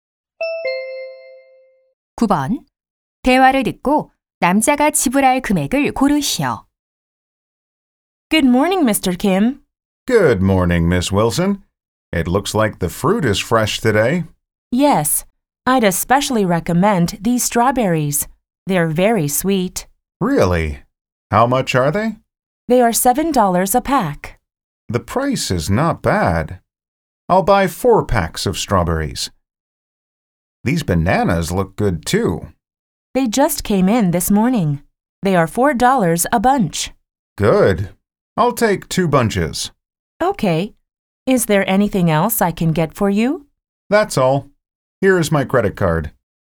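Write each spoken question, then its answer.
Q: 대화를 듣고 남자가 지불할 금액을 고르시오.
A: $36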